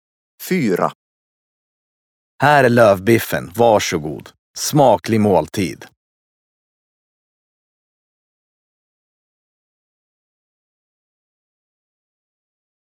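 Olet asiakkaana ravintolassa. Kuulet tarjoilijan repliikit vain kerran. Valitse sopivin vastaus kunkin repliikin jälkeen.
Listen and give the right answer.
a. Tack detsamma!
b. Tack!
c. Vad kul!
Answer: b. Tack!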